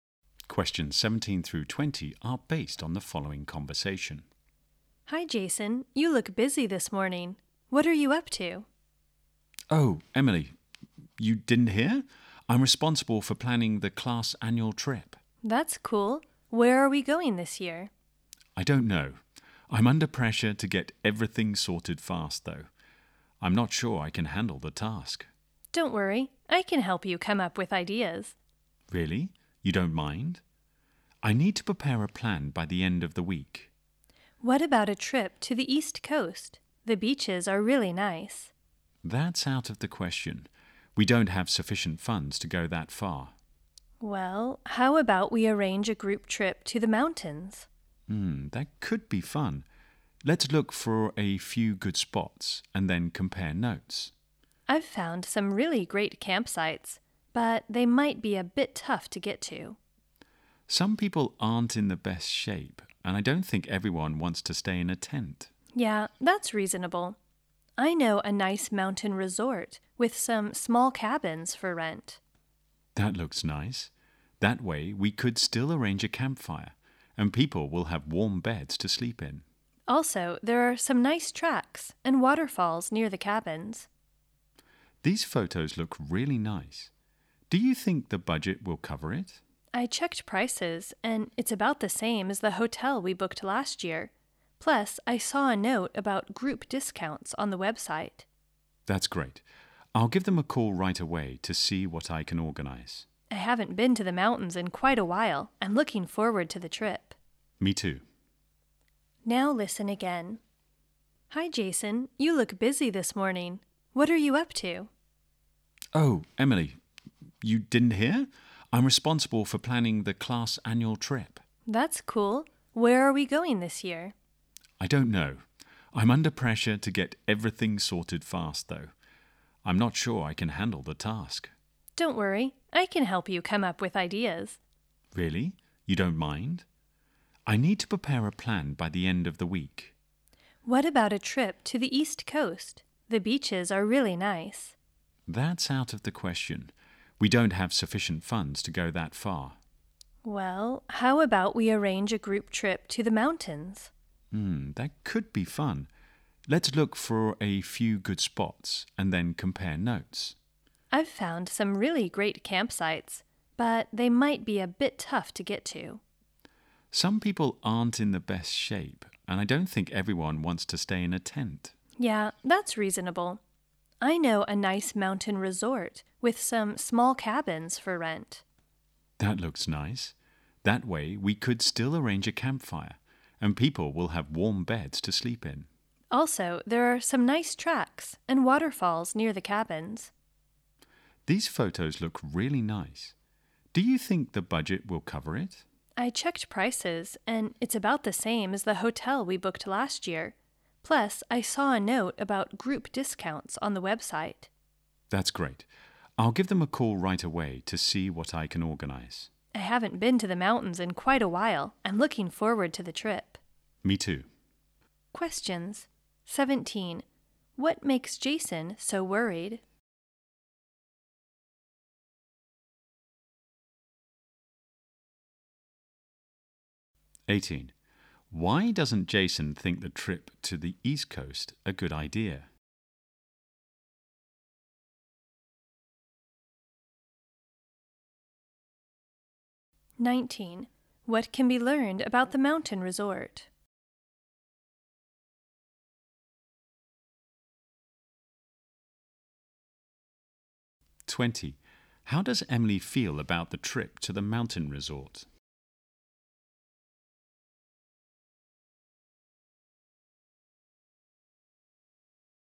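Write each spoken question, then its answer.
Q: What makes Jason so worried?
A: He has to plan the class annual trip quickly

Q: Why doesn't Jason think the trip to the East Coast a good idea?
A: They don't have enough money to go that far

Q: How does Emily feel about the trip to the mountain resort?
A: She is looking forward to it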